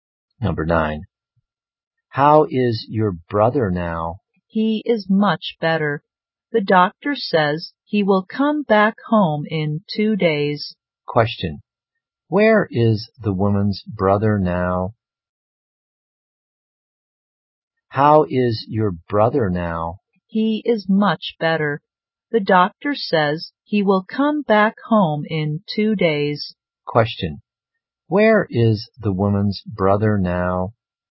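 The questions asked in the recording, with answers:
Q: Question, where is the woman's brother now?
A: In hospital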